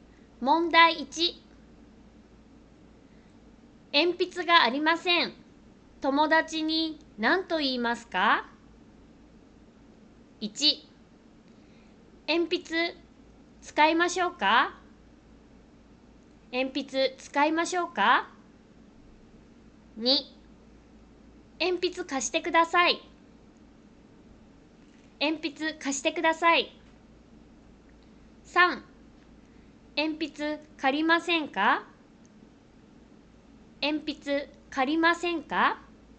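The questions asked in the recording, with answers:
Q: 鉛筆がありません。友達に何と言いますか?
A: 2: 鉛筆貸してください。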